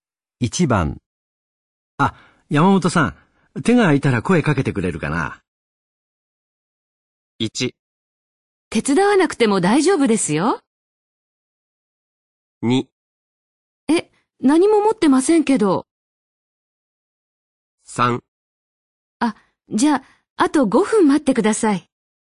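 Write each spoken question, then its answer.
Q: あ、山本さん、手が空いたら声かけてくれるかな。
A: 3: あ、じゃあ、あと5分待ってください。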